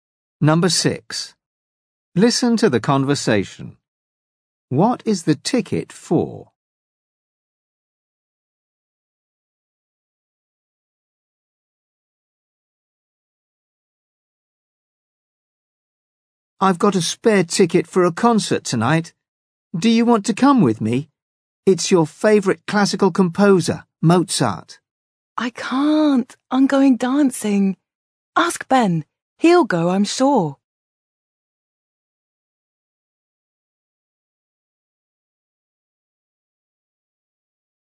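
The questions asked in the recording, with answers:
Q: What is the ticket for?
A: A classical music concert (Mozart)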